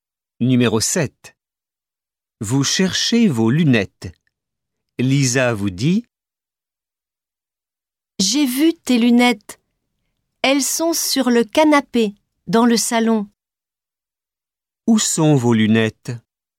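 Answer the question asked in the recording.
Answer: Sur le canapé, dans le salon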